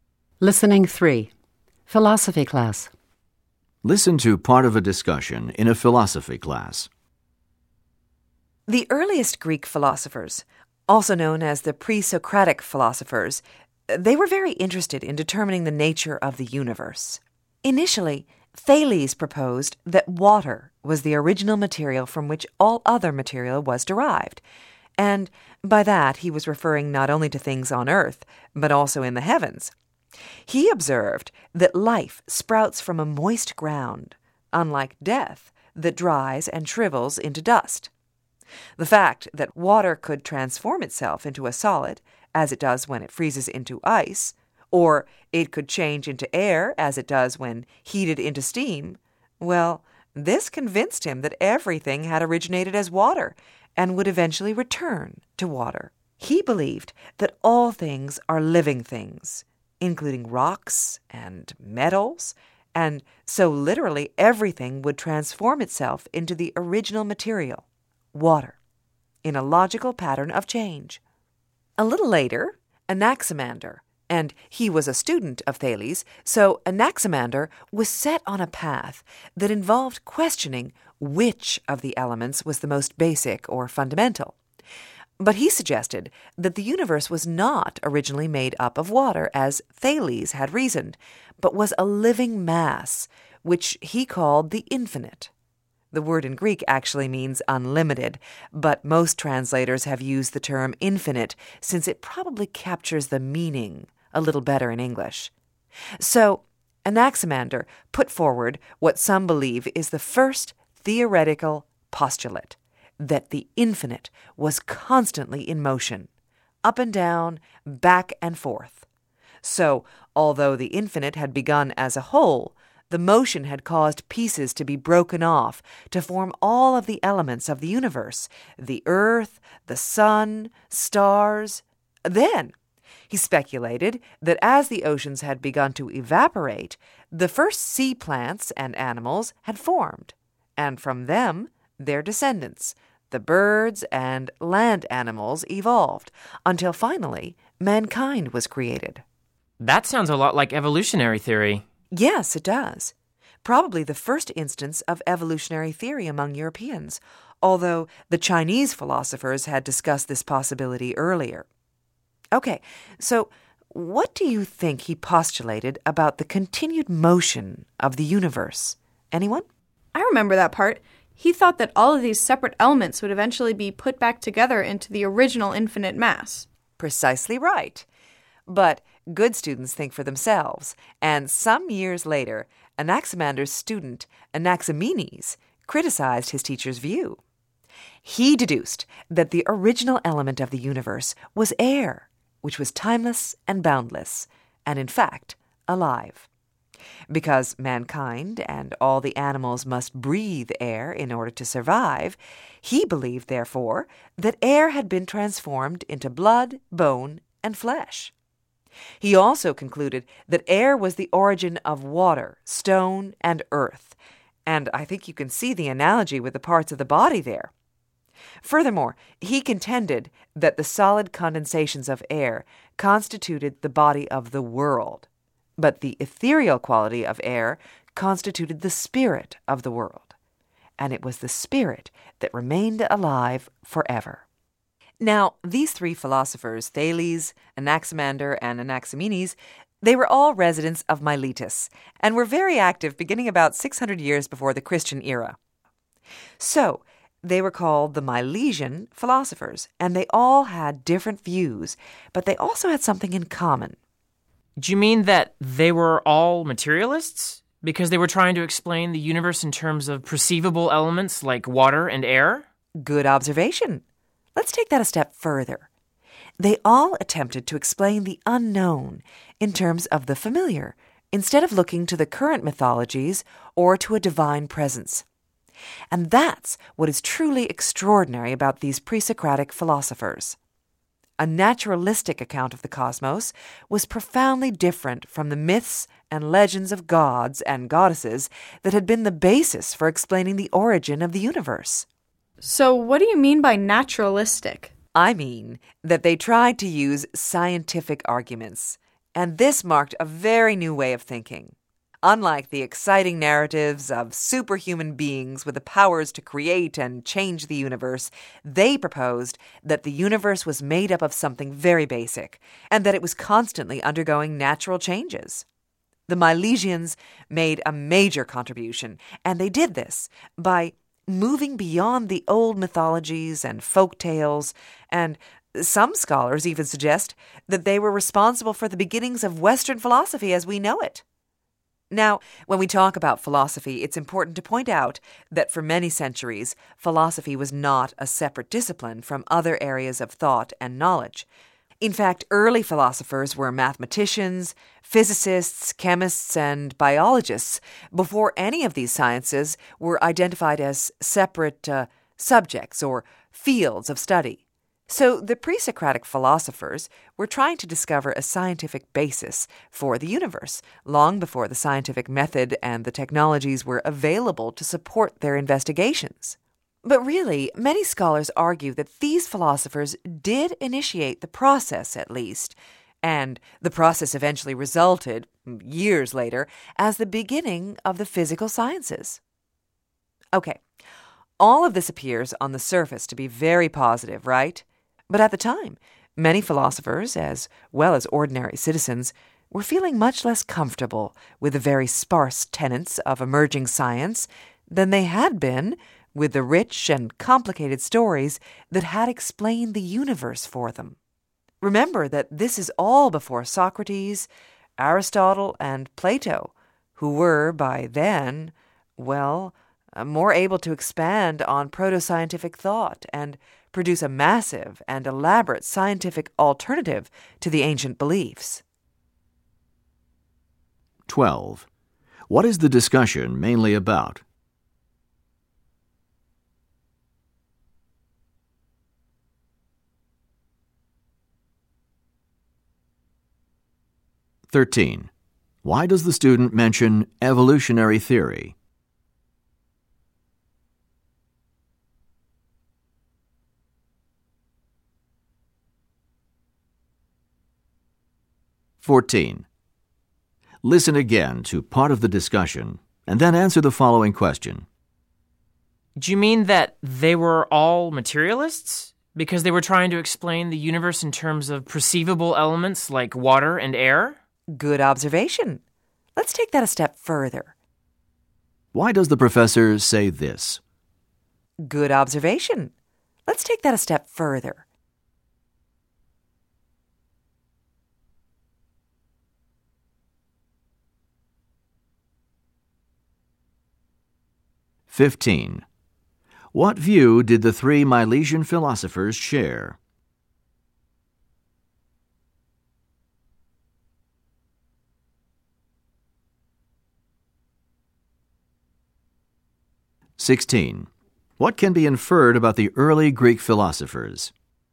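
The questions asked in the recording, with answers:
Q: What is the discussion mainly about?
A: The early Milesian (pre-Socratic) philosophers' views on the nature of the universe

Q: What view did the three Milesian philosophers share?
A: They explained the universe naturally, in terms of familiar basic elements rather than myths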